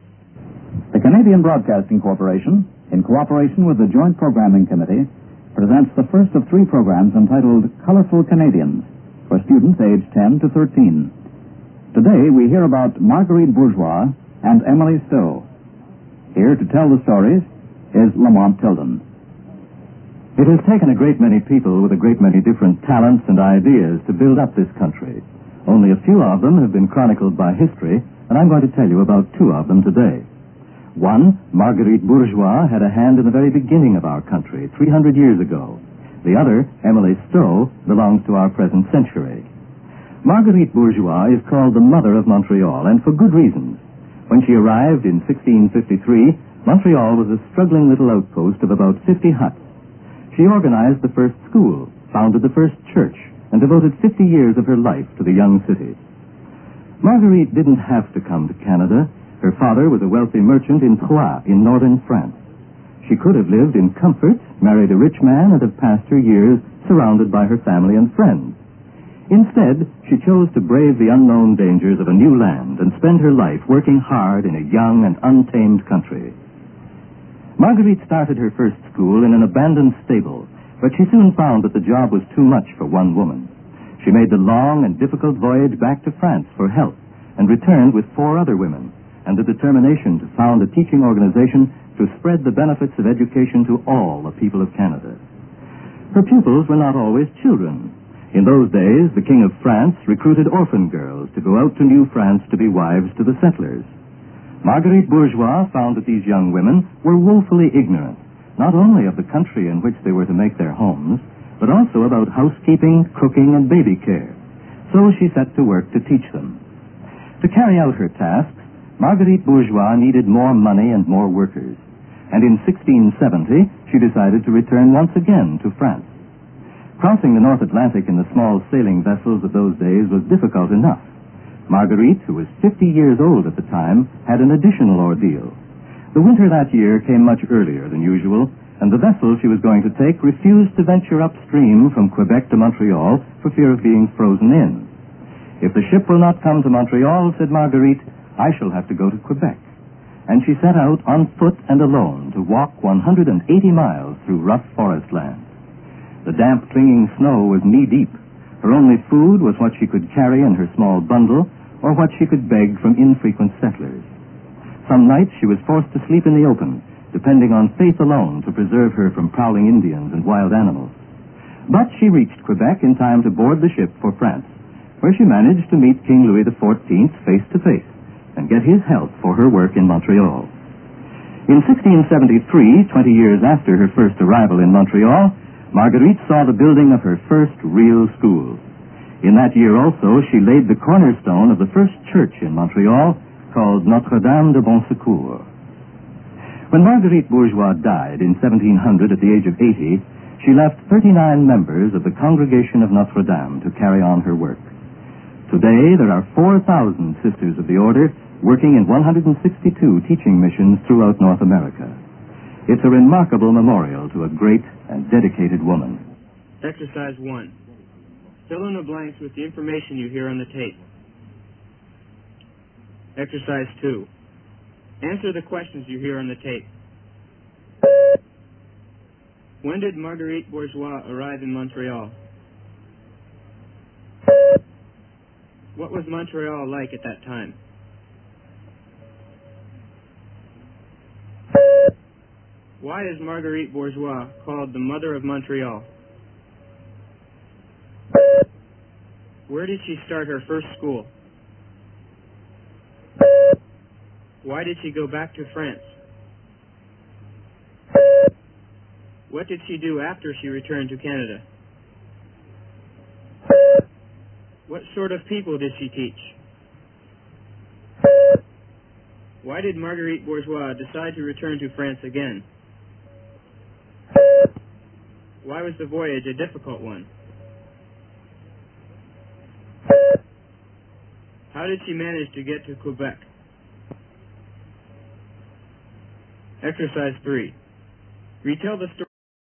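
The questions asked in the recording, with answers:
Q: When did Marguerite Bourgeois arrive in Montreal?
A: In 1653

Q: What was Montreal like at that time?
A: A struggling little outpost of about 50 huts

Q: Why is Marguerite Bourgeois called the mother of Montreal?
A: She organized the first school, founded the first church, and devoted 50 years of her life to the city

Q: Where did she start her first school?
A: In an abandoned stable

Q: Why did she go back to France?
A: The job was too much for one woman, so she went for help

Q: What did she do after she returned to Canada?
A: She returned with four other women and set out to found a teaching organization

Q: What sort of people did she teach?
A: Children, and also orphan girls sent from France to be settlers' wives

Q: Why did Marguerite Bourgeois decide to return to France again?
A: She needed more money and more workers

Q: How did she manage to get to Quebec?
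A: She walked 180 miles alone through the forest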